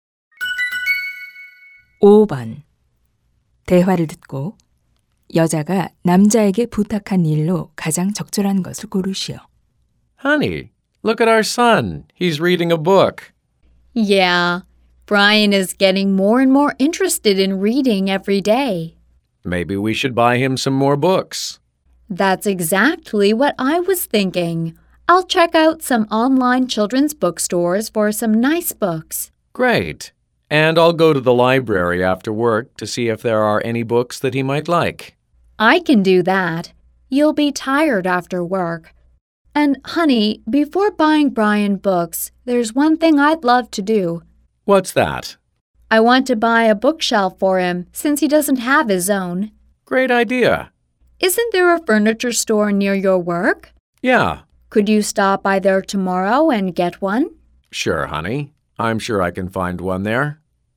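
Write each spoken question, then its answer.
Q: 대화를 듣고 여자가 남자에게 부탁한 일로 가장 적절한 것을 고르시오.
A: 가구점에 들러 책장 사 오기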